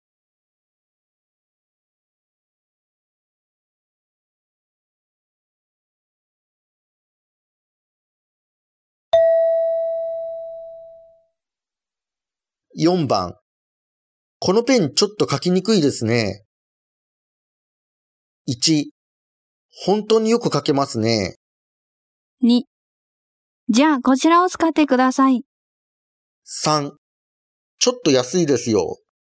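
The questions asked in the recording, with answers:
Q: このペンちょっと書きにくいですね。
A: 2: じゃあこちらを使ってください。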